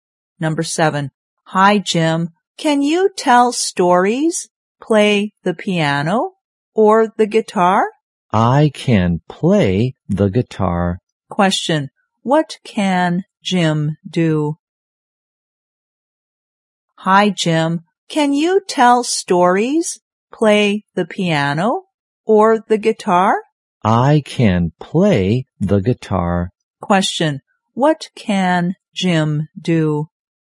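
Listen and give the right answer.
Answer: Play the guitar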